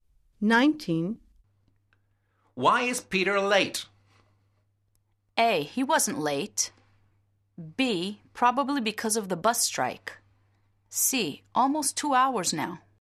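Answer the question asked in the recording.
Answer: B: Probably because of the bus strike.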